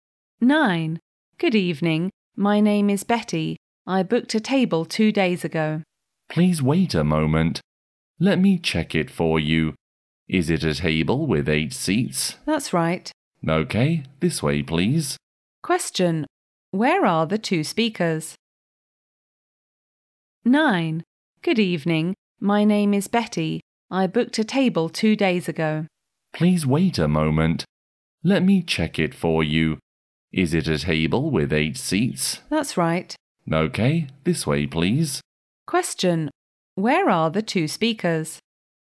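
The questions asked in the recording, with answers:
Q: Where are the 2 speakers?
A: In a restaurant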